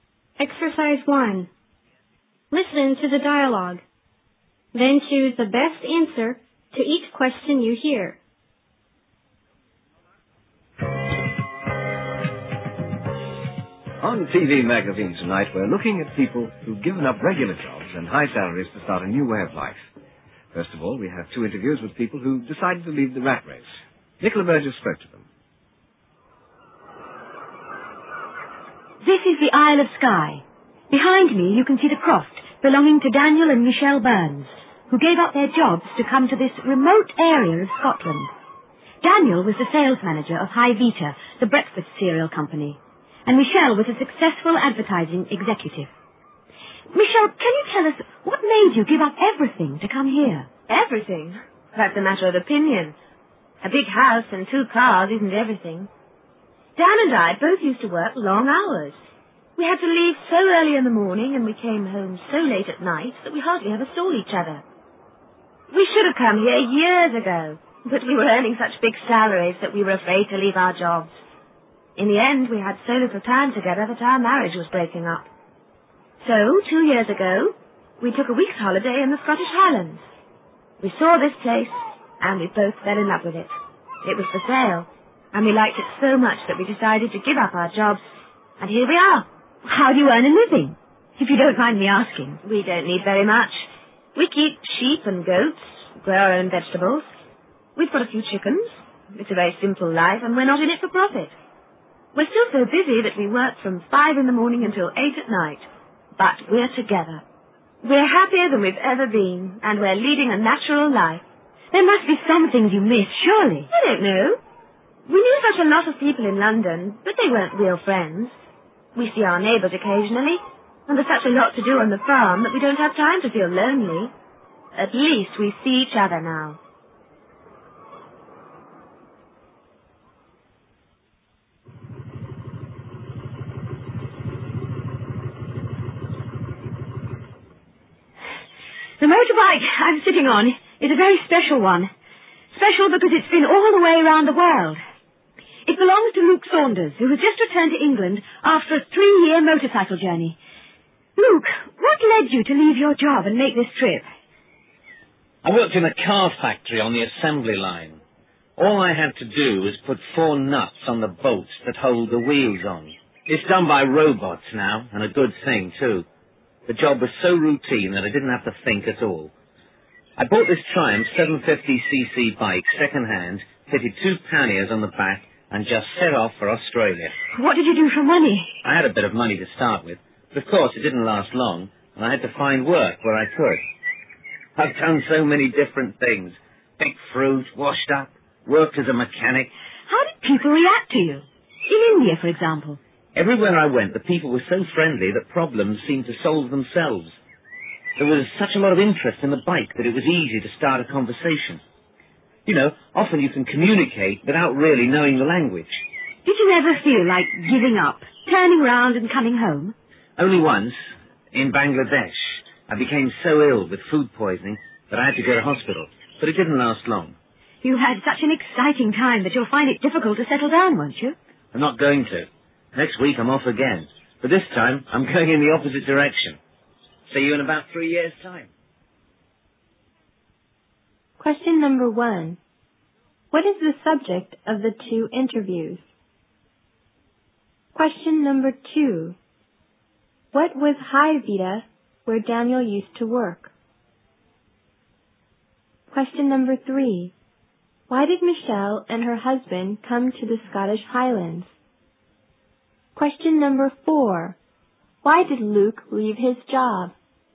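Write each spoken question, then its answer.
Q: What is the subject of the 2 interviews?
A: People who gave up regular jobs and high salaries to start a new way of life

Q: What was High Vita, where Daniel used to work?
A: A breakfast cereal company

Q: Why did Michelle and her husband come to the Scottish Highlands?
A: They were so busy they hardly saw each other and their marriage was breaking up, so they gave up their jobs to live a simpler life together

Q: Why did Luke leave his job?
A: The job was so routine and boring that he didn't have to think at all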